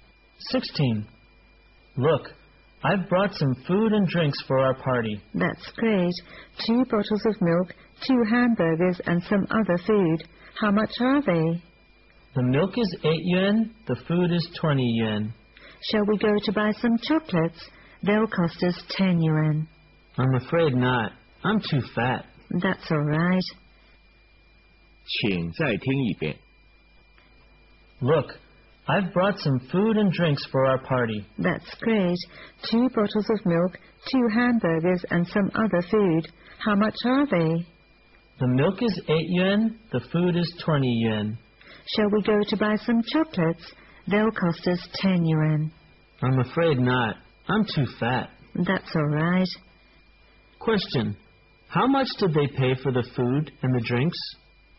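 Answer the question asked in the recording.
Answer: 28 yuan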